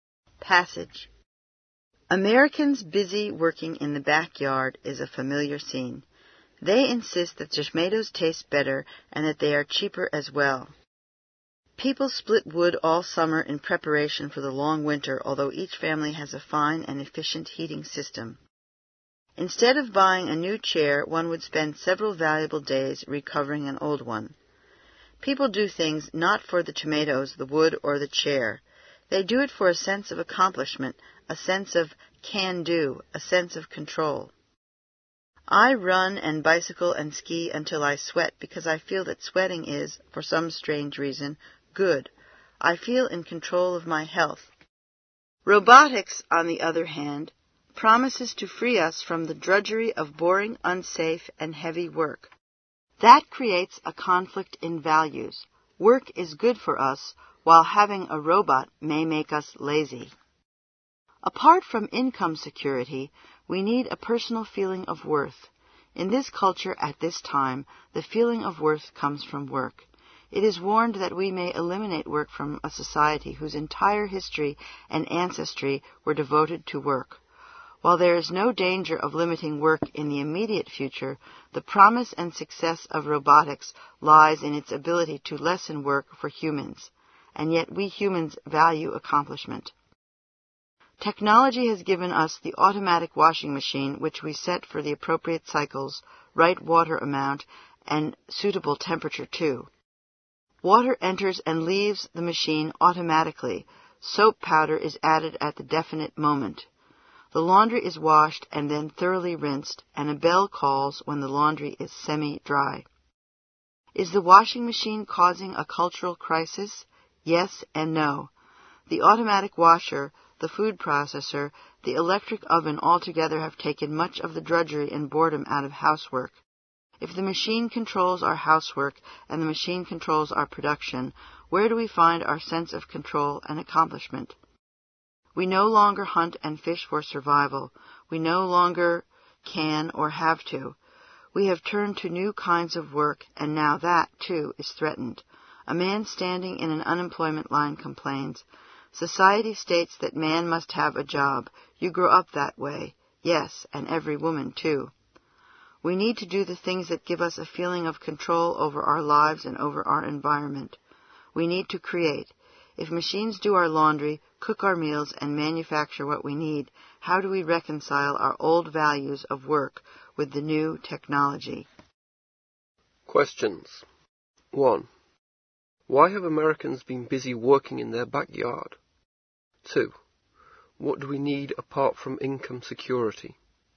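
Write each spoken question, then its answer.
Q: Why have Americans been busy working in their backyard?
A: For a sense of accomplishment and control

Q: What do we need apart from income security?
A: A personal feeling of worth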